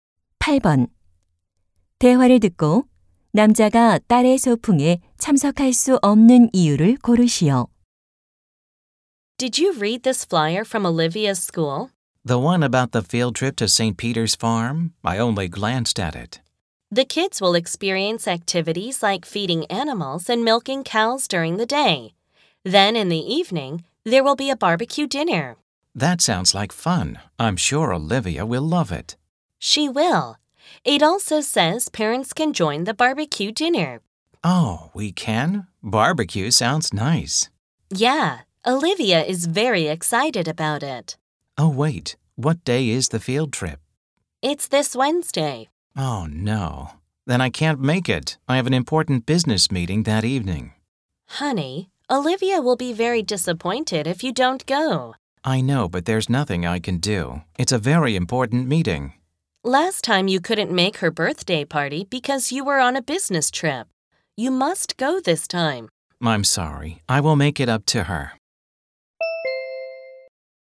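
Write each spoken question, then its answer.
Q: 대화를 듣고 남자가 딸의 소풍에 참석할 수 없는 이유를 고르시오.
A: 그날 저녁에 중요한 업무 회의가 있어서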